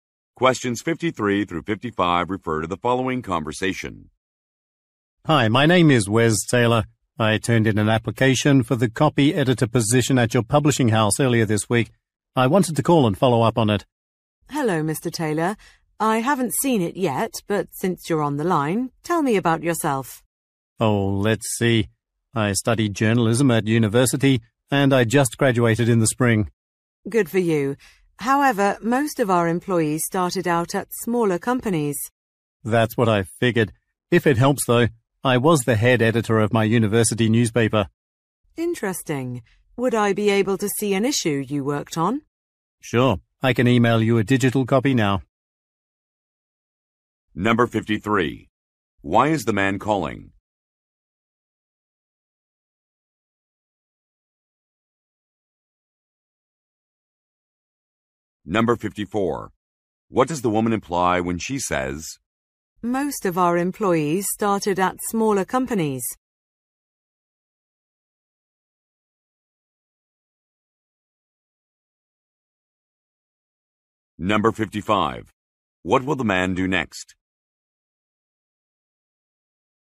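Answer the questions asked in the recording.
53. To follow up on a job application
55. Email a digital copy of a newspaper issue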